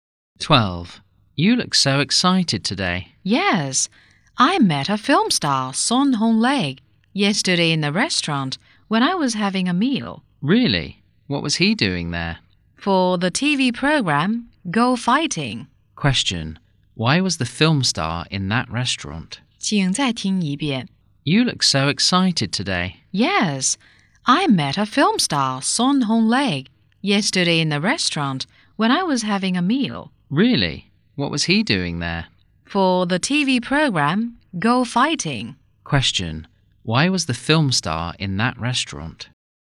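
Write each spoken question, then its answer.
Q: why was the film star in that restaurant?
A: For the TV program Go Fighting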